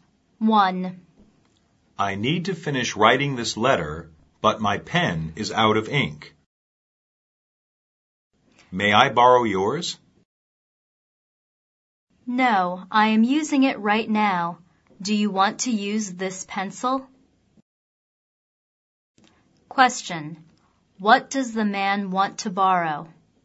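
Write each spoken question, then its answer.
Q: What does the man want to borrow?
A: A pen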